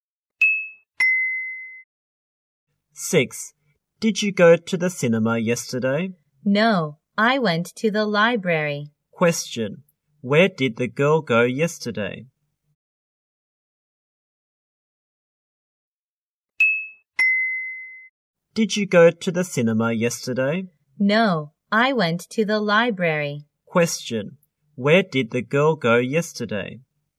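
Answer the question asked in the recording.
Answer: To the library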